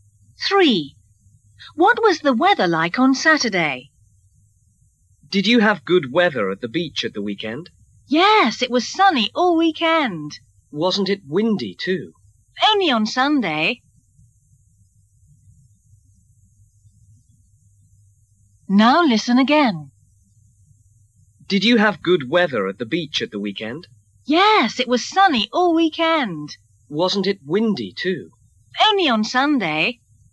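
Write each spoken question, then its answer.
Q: What was the weather like on Saturday?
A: Sunny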